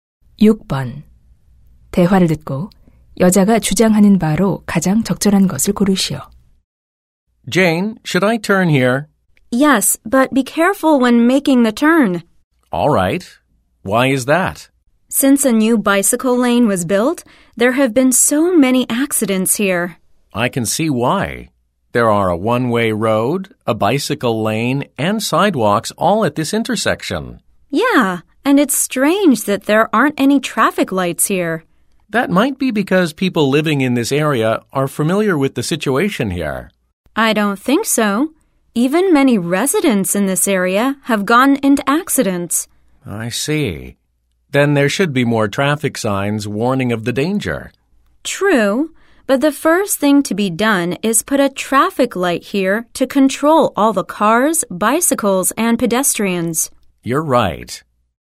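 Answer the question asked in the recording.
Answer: 교차로에 신호등을 설치해야 한다.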